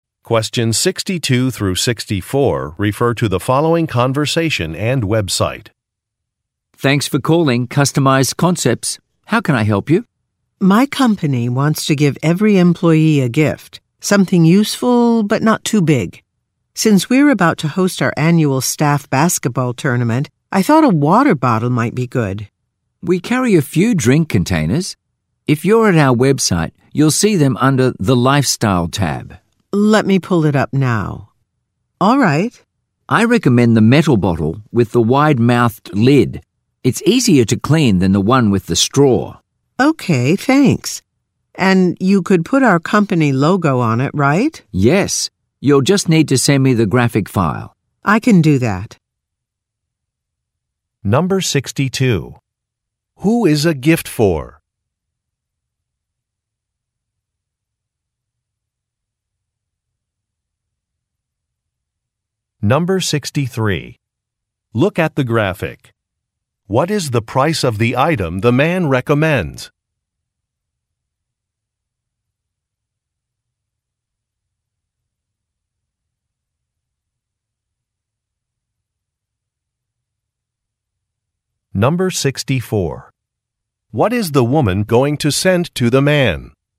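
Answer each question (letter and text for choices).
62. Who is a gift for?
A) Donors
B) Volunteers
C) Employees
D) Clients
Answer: C) Employees

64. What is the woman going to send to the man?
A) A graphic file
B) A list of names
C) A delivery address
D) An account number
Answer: A) A graphic file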